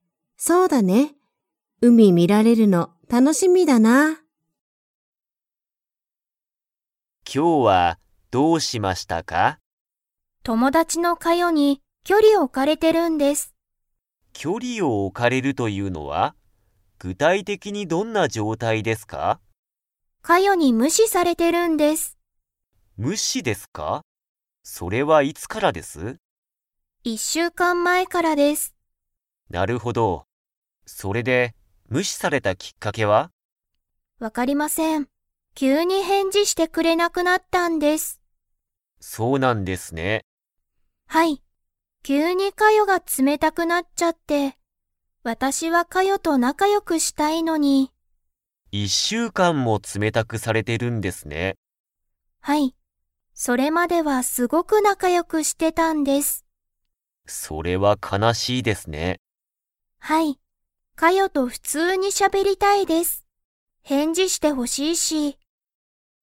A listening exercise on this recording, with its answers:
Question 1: アヤは、いつからカヨに無視むしされていますか?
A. 昨日きのう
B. 正月しょうがつ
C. 三日みっか前まえ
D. 一週間いっしゅうかん前まえ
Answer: 一週間いっしゅうかん前まえ

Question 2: アヤは、カヨと 。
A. しゃべりたい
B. しゃべりたくない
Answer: しゃべりたい

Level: Level 4

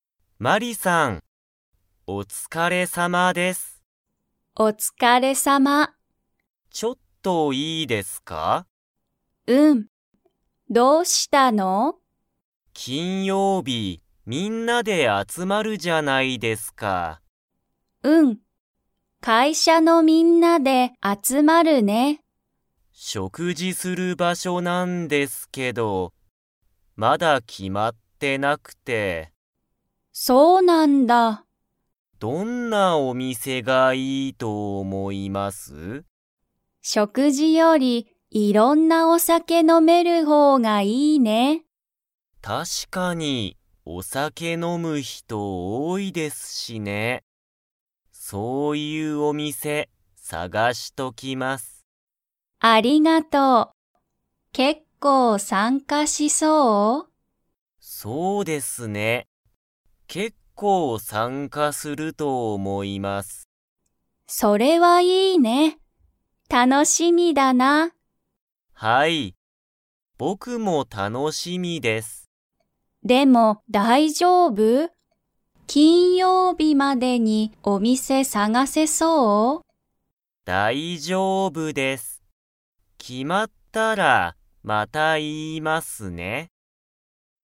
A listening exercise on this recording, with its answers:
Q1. いつ、会社かいしゃのみんなで集あつまりますか?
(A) 木曜日もくようび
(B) 金曜日きんようび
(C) 土曜日どようび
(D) 日曜日にちようび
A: 金曜日きんようび

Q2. お酒さけ飲のむ人ひとは 。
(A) 多おおい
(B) 少すくない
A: 多おおい

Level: Level 3

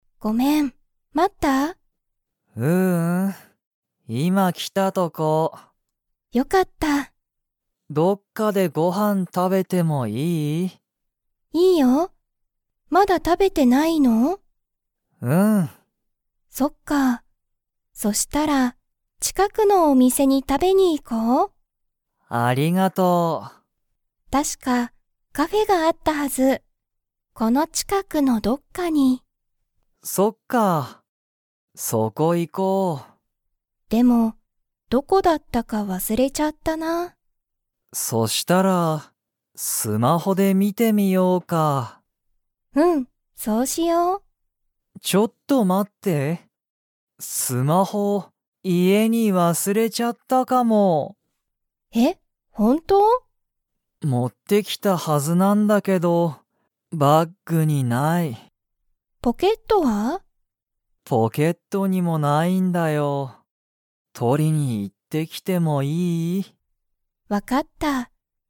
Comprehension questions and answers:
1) カイトは、もうご飯はんを食たべましたか?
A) はい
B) いいえ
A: いいえ

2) カイトは、____を家いえに忘わすれたかもしれない。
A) カフェ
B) バッグ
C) ポケット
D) スマホ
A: スマホ

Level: Level 2

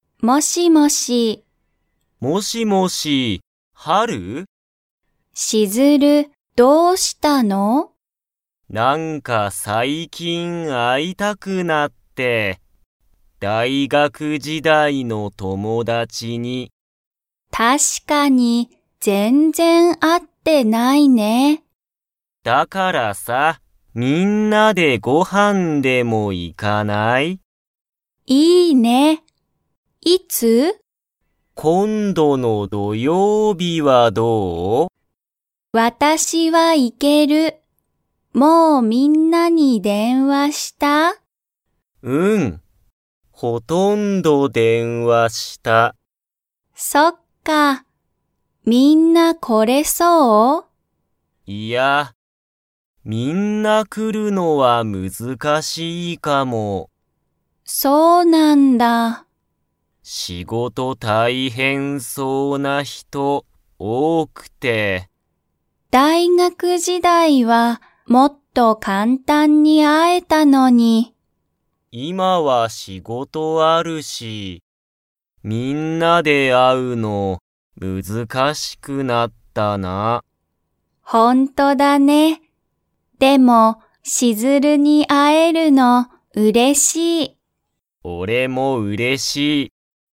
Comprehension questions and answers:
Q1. ハルは、今度(こんど)の____にみんなでご飯(はん)に行(い)く。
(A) 大学時代(だいがくじだい)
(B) ほとんど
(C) 土曜日(どようび)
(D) 明日(あした)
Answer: 土曜日(どようび)

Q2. みんな来(こ)れそうですか?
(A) はい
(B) いいえ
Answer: いいえ

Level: Level 2

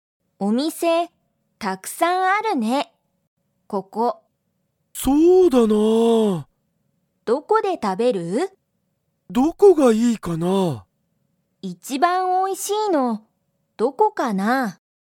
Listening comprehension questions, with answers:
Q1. ここは、お店みせがたくさんありますか?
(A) はい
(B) いいえ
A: はい

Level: Level 1

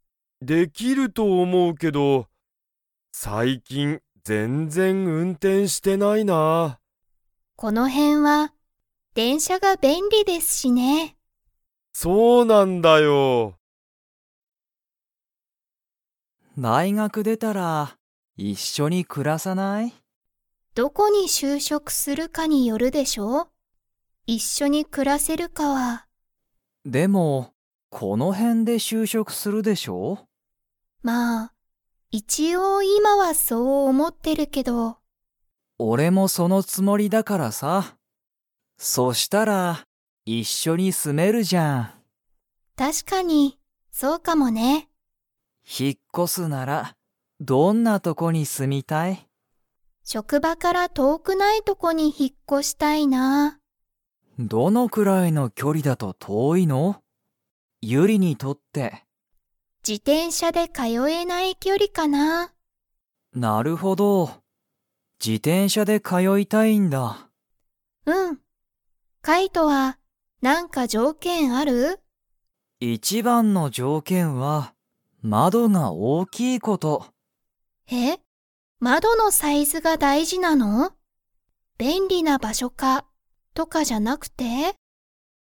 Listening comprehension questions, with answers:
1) カイトは、この辺へんで就職しゅうしょくするつもりですか?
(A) はい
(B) いいえ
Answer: はい

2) ユリは、 で職場しょくばに通かよいたい。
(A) 車くるま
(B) バス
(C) 電車でんしゃ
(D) 自転車じてんしゃ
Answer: 自転車じてんしゃ

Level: Level 4

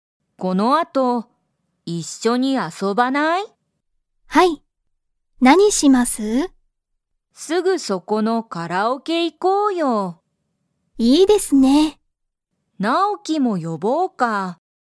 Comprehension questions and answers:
Comprehension Quiz (Skip if you don't understand the conversation yet)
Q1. ユウコとリカは、____カラオケに行いく。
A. 毎日まいにち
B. すぐそこの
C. この前まえの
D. 後あとの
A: すぐそこの

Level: Level 1

